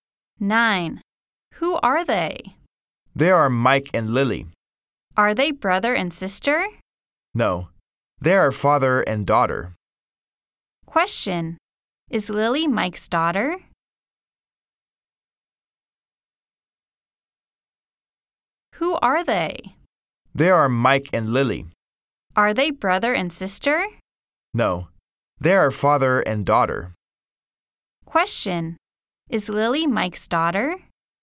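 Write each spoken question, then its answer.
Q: Question. Is Lily Mike's daughter?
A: Yes, she is.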